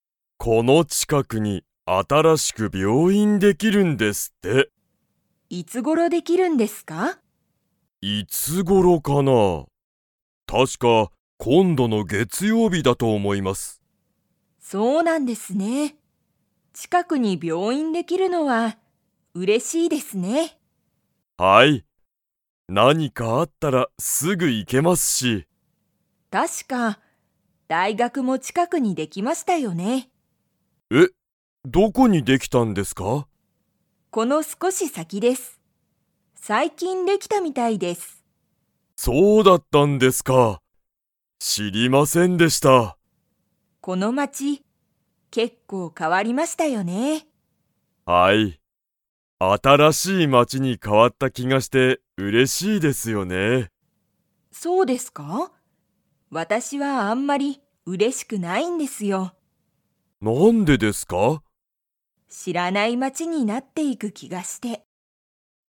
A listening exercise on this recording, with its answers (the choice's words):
Comprehension Quiz (Skip if you don't understand the conversation yet)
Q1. 松井まついさんは、近ちかくに病院びょういんができるのが嬉うれしいですか?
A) はい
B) いいえ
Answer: はい

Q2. 大学だいがくが____できた。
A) 今度こんどの月曜日げつようびに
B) 結構けっこうすぐ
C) 新あたらしい町まちに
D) この少すこし先さきに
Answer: この少すこし先さきに

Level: Level 2